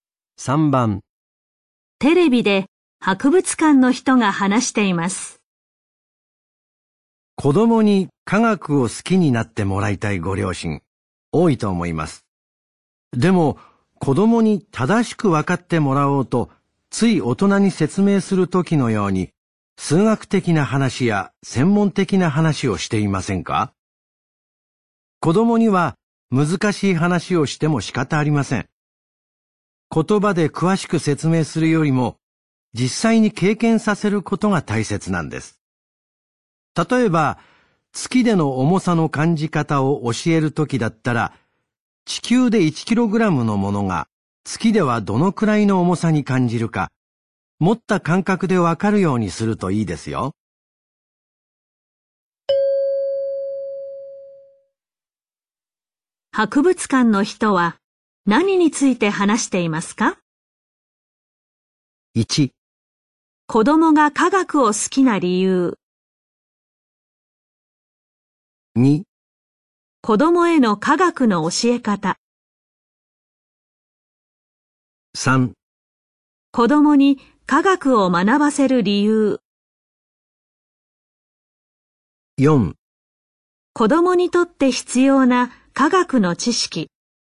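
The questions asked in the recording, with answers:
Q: 博物館の人は何について話していますか?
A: 2: 子供への科学の教え方。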